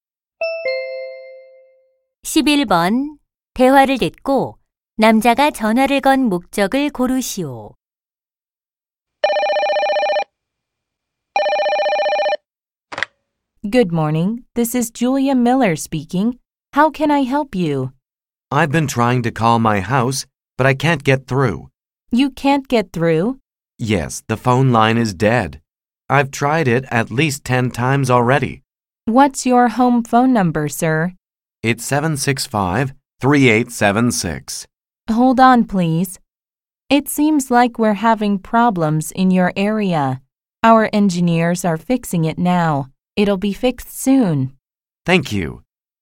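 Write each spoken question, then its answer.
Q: 대화를 듣고 남자가 전화를 건 목적을 고르시오.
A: 집 전화 고장 신고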